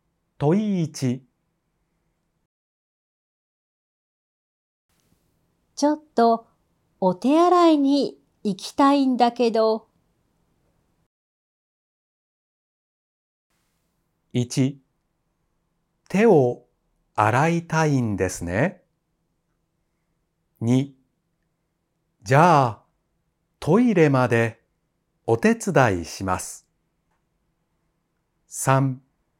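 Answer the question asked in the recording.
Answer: 2: じゃあ、トイレまでお手伝いします。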